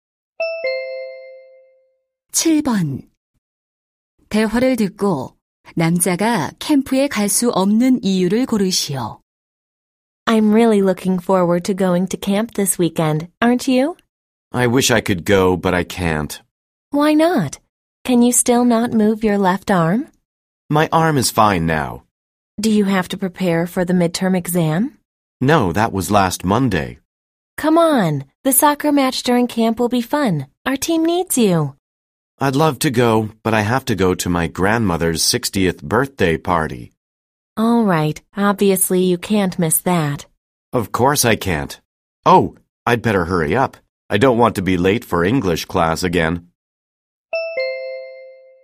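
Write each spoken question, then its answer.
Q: 대화를 듣고 남자가 캠프에 갈 수 없는 이유를 고르시오.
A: 할머니의 60번째 생신 파티에 가야 해서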